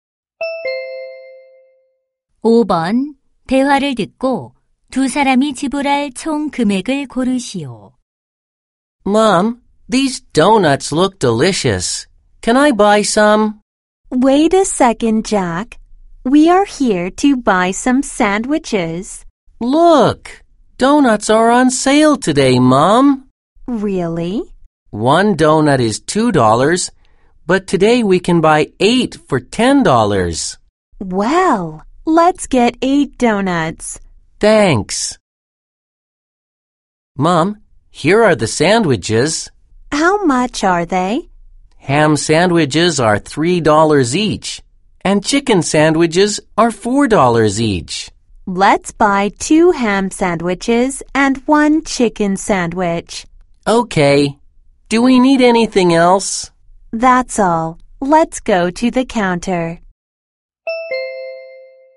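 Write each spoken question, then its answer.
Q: 대화를 듣고 두 사람이 지불할 총 금액을 고르시오.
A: $20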